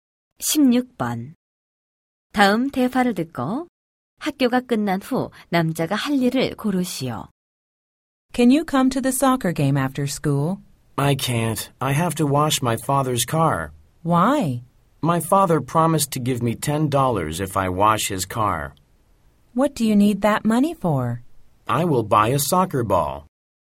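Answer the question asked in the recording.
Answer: 아버지의 차 세차하기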